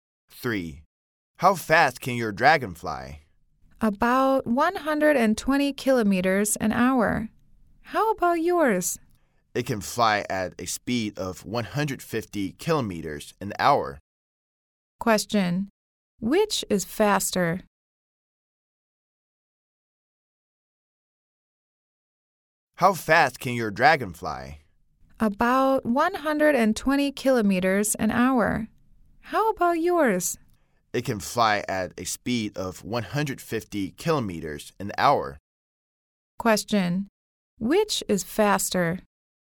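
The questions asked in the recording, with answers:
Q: Which is faster?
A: The second speaker's dragon (150 km an hour)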